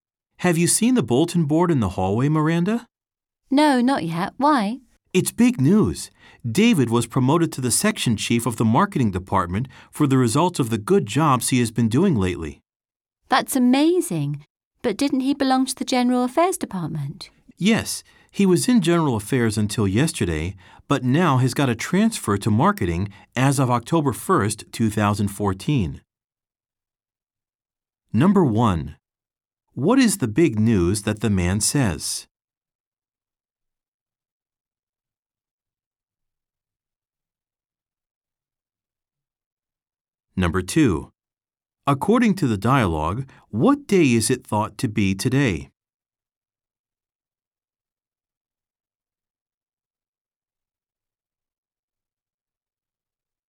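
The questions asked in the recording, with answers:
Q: What is the big news that the man says?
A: David was promoted to section chief of the marketing department.

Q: According to the dialogue, what day is it thought to be today?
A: October 1st, 2014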